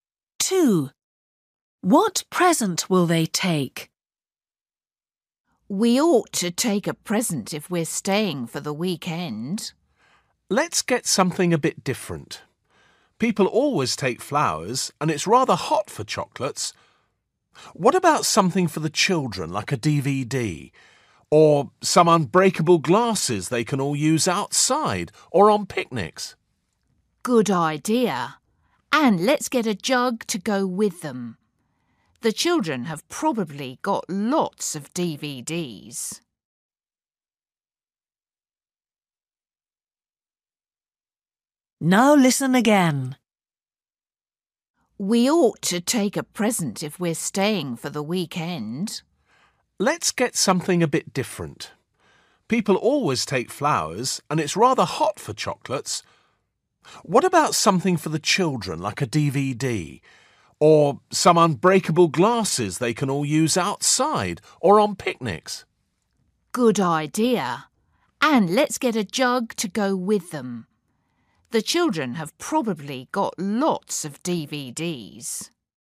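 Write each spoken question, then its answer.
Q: What present will they take?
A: unbreakable glasses and a jug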